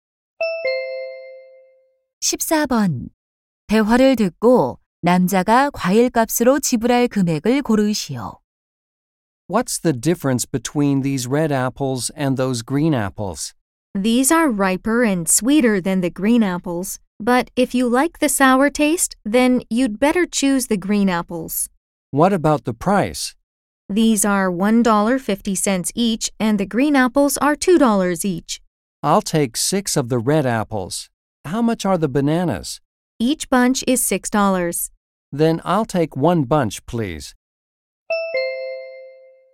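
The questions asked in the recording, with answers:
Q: 대화를 듣고 남자가 과일값으로 지불할 금액을 고르시오.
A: 15달러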